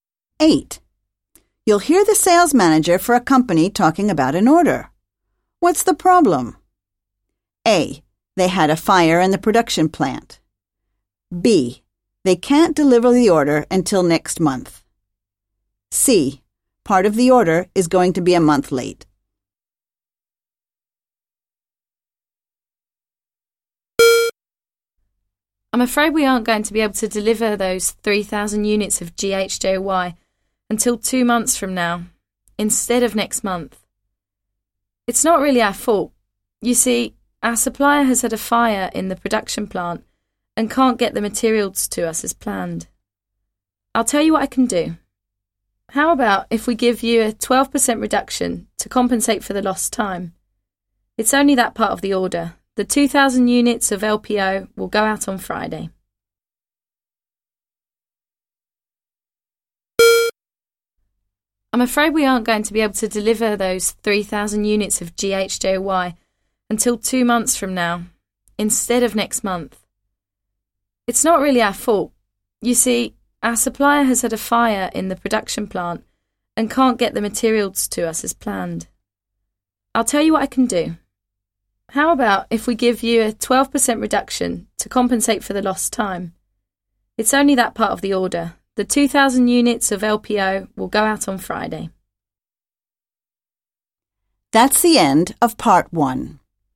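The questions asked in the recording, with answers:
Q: What's the problem?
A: C: Part of the order is going to be a month late.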